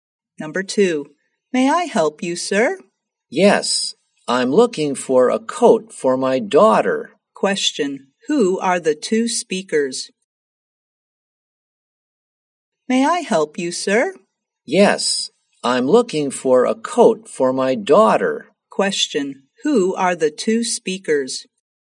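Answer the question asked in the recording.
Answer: A shop assistant and a customer.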